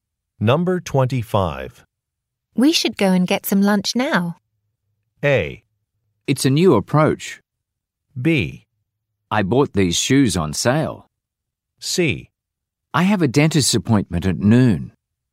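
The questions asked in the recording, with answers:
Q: We should go and get some lunch now.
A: C: I have a dentist's appointment at noon.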